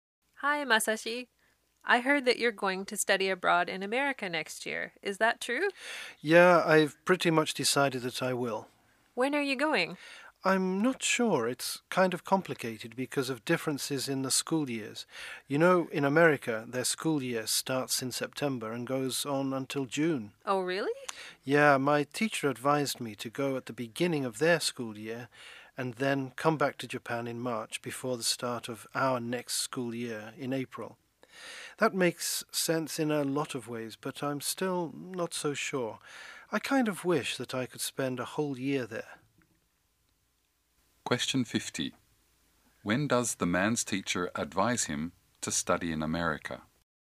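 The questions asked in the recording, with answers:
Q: When does the man's teacher advise him to study in America?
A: From the start of the American school year in September until March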